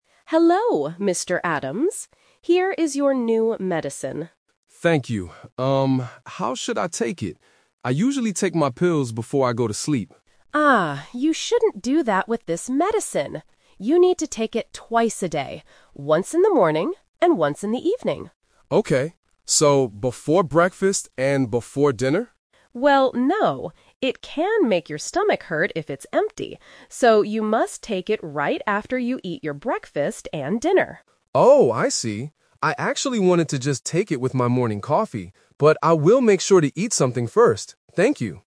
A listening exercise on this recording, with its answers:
Listen to the conversation and choose the correct answer (A, B, or C).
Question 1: When did Mr. Adams usually take his pills in the past?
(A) Before going to sleep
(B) Before breakfast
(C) After dinner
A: (A) Before going to sleep

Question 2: How often does Mr. Adams need to take the new medicine?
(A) Once a day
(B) Twice a day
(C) Three times a day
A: (B) Twice a day

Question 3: When must Mr. Adams take his new medicine?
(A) Before he eats anything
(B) With his morning coffee only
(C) After his meals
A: (C) After his meals

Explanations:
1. Mr. Adams says, "I usually take my pills before I go to sleep." Option B (Before breakfast) is a trap because he asked if he should do that with the new medicine. Option C is part of the new rule, not his past habit.
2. The pharmacist clearly says, "You need to take it twice a day." Options A and C are not mentioned in the audio.
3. The pharmacist says, "you must take it right after you eat your breakfast and dinner." Option A is a trap because the pharmacist says "no" to taking it before meals (when the stomach is empty). Option B is a trap because Mr. Adams wanted to take it with just coffee, but he changed his mind ("but I will make sure to eat something first").

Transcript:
Pharmacist: Hello, Mr. Adams. Here is your new medicine.
Mr. Adams: Thank you. Um, how should I take it? I usually take my pills before I go to sleep.
Pharmacist: Ah, you shouldn't do that with this medicine. You need to take it twice a day. Once in the morning, and once in the evening.
Mr. Adams: Okay. So, before breakfast and before dinner?
Pharmacist: Well, no. It can make your stomach hurt if it's empty. So, you must take it right after you eat your breakfast and dinner.
Mr. Adams: Oh, I see. I actually wanted to just take it with my morning coffee, but I will make sure to eat something first. Thank you!

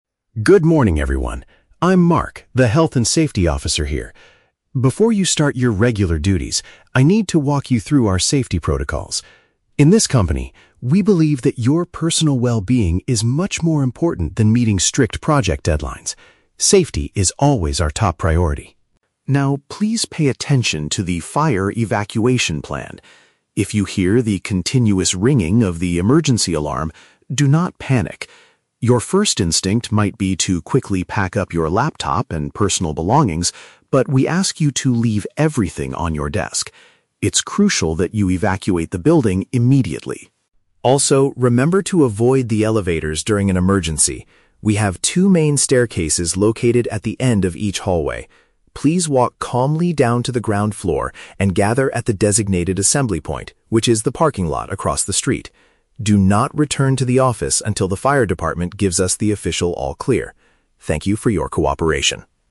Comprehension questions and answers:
Listen to the Health and Safety Officer's presentation and choose the correct answer (A, B, or C).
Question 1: What is the company's core philosophy regarding its employees?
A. Their physical safety is prioritized over finishing work tasks.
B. They must meet strict project deadlines to keep their jobs safe.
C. They are required to take regular breaks to improve their mental health.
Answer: A. Their physical safety is prioritized over finishing work tasks.

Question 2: What should staff members do when the emergency bell rings?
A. Secure their laptops and bags before leaving the office.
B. Exit the premises without taking their personal items.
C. Call the local fire department to report the situation.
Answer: B. Exit the premises without taking their personal items.

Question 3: Where should the workers meet after escaping the building?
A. On the ground floor at the end of the hallway.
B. Inside the main elevators on the first floor.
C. At the vehicle parking area opposite the office.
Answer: C. At the vehicle parking area opposite the office.

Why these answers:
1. Mark states that "personal well-being is much more important than meeting strict project deadlines." Option A paraphrases this perfectly by saying "physical safety is prioritized over finishing work tasks." Why the trap is wrong: Option (B) is a trap. The audio mentions "strict project deadlines," but Mark says safety is more important than deadlines, not that deadlines keep jobs safe. Option (C) is a plausible workplace policy but is never mentioned in the monologue.
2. Mark tells the employees to "evacuate the building immediately" (exit the premises) and "leave everything on your desk" (without taking personal items). Why the trap is wrong: Option (A) is a trap. Mark says your "first instinct might be to quickly pack up your laptop," but he explicitly tells you not to do that. Option (C) is a plausible action during a fire, but Mark does not instruct the staff to call the fire department.
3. The officer instructs everyone to gather at the "parking lot across the street." Option C uses synonyms ("vehicle parking area opposite the office") to express this exact location.

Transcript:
Mark: Good morning, everyone. I'm Mark, the Health and Safety Officer here. Before you start your regular duties, I need to walk you through our safety protocols. In this company, we believe that your personal well-being is much more important than meeting strict project deadlines. Safety is always our top priority.
Now, please pay attention to the fire evacuation plan. If you hear the continuous ringing of the emergency alarm, do not panic. Your first instinct might be to quickly pack up your laptop and personal belongings, but we ask you to leave everything on your desk. It's crucial that you evacuate the building immediately.
Also, remember to avoid the elevators during an emergency. We have two main staircases located at the end of each hallway. Please walk calmly down to the ground floor and gather at the designated assembly point, which is the parking lot across the street. Do not return to the office until the fire department gives us the official all-clear. Thank you for your cooperation.

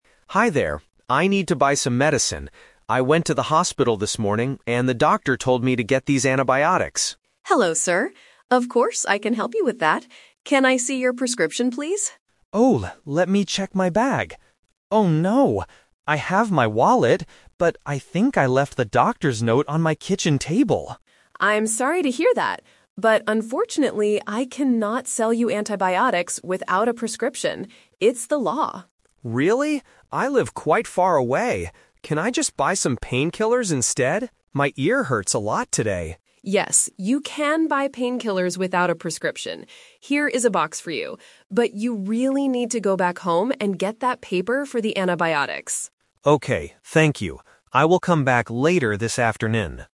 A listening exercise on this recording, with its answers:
Listen to a conversation between a patient and a pharmacist. Choose the correct answer (A, B, or C) for each question.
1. What did the man leave at his house?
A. His wallet.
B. His doctor's prescription.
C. His box of painkillers.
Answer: B. His doctor's prescription.

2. Why CANNOT the pharmacist sell the antibiotics to the man?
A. Because they do not have any antibiotics left.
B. Because he does not have enough money.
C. Because it is against the law without a doctor's note.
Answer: C. Because it is against the law without a doctor's note.

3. What does the man actually buy right now?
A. A box of painkillers.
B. Some antibiotics.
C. He does not buy anything.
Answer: A. A box of painkillers.

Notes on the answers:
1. The man says, "I think I left the doctor's note on my kitchen table." (A doctor's note is a prescription). The Trap: Option A is a trap. He explicitly says, "I have my wallet," meaning he did not leave it at home. Option C is a trap because the painkillers are what he buys at the pharmacy, not what he left at home.
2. The pharmacist clearly states, "I cannot sell you antibiotics without a prescription. It's the law." The Trap: Option A is a plausible reason in real life, but the pharmacist does not say they are sold out. Option B is a trap because the man has his wallet, so money is not the problem.
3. The pharmacist says, "Yes, you can buy painkillers without a prescription. Here is a box for you." The Trap: Option B is the man's original plan, but he cannot do it (The A2 Twist). Option C is a trap because he originally couldn't buy his main medicine, but he decides to buy painkillers instead of leaving with nothing.

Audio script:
Patient: Hi there. I need to buy some medicine. I went to the hospital this morning, and the doctor told me to get these antibiotics.
Pharmacist: Hello, sir. Of course, I can help you with that. Can I see your prescription, please?
Patient: Oh, let me check my bag. Oh no! I have my wallet, but I think I left the doctor's note on my kitchen table.
Pharmacist: I'm sorry to hear that. But unfortunately, I cannot sell you antibiotics without a prescription. It's the law.
Patient: Really? I live quite far away. Can I just buy some painkillers instead? My ear hurts a lot today.
Pharmacist: Yes, you can buy painkillers without a prescription. Here is a box for you. But you really need to go back home and get that paper for the antibiotics.

